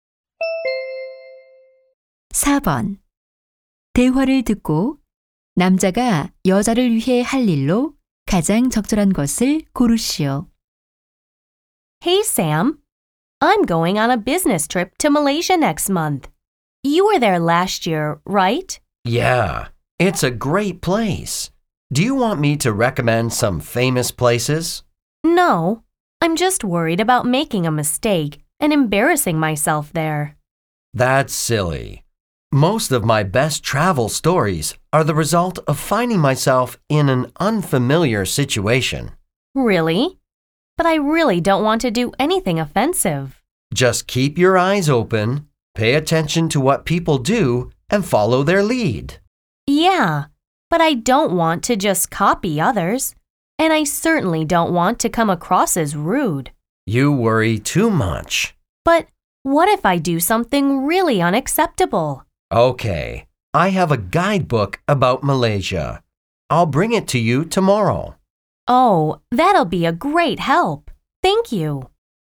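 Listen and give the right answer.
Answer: 말레이시아 여행 안내서 가져다주기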